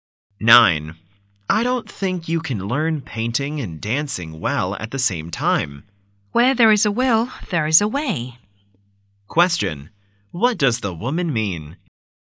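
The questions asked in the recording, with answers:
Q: What does the woman mean?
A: She can learn both well if she is determined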